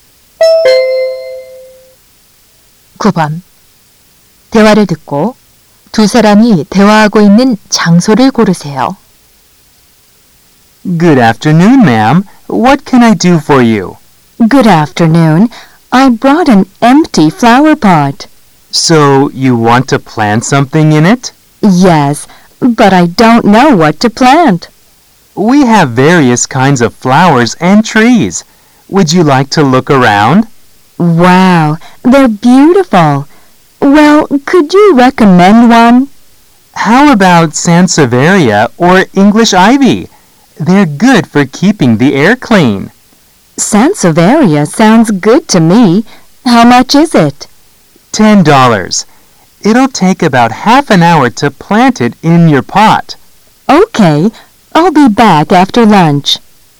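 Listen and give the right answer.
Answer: 꽃집(화원)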